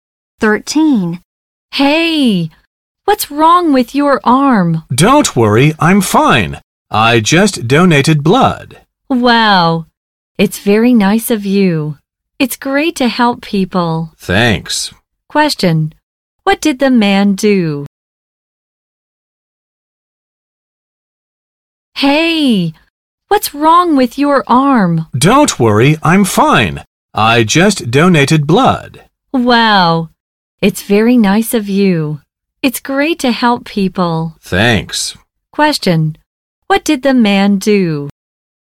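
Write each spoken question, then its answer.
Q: what did the man do?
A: He donated blood.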